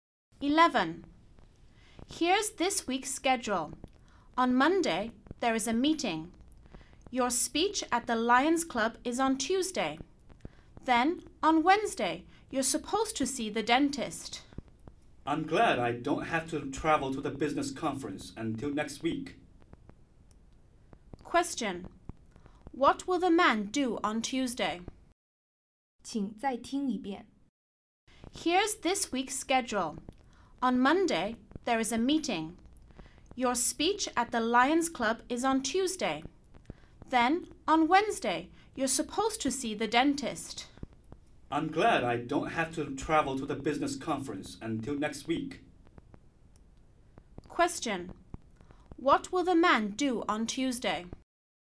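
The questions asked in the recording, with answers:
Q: What will the man do on Tuesday?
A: Give a speech at the Lions Club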